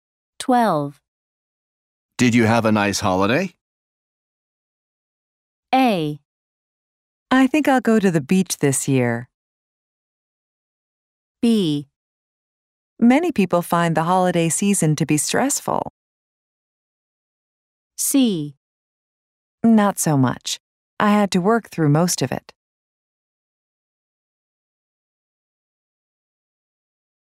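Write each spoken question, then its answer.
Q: Did you have a nice holiday?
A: C: Not so much. I had to work through most of it.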